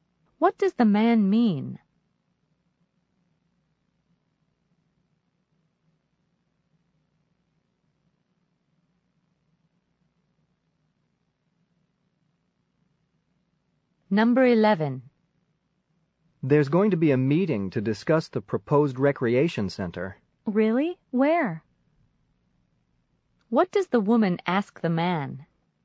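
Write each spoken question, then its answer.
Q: What does the woman ask the man?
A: Where the meeting will be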